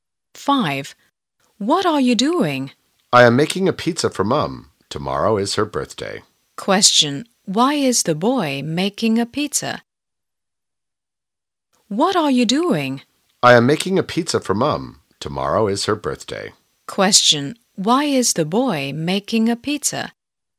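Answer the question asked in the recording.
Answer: Because tomorrow is his mum's birthday.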